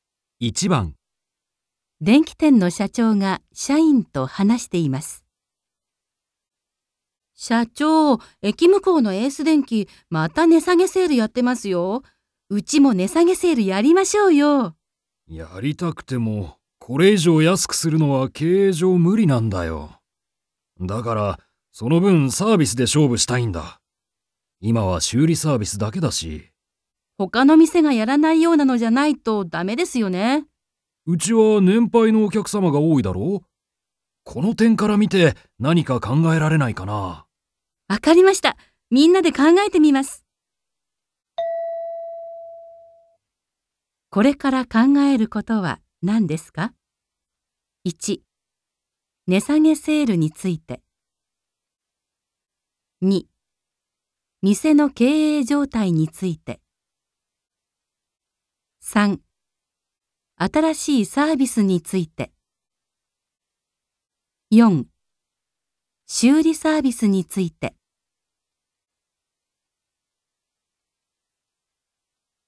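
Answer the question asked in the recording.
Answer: 3: 新しいサービスについて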